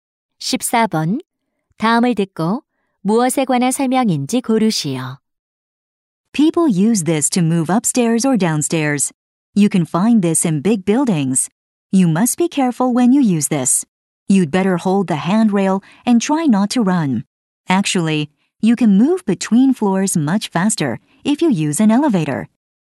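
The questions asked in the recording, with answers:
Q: 다음을 듣고 무엇에 관한 설명인지 고르시오.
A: 에스컬레이터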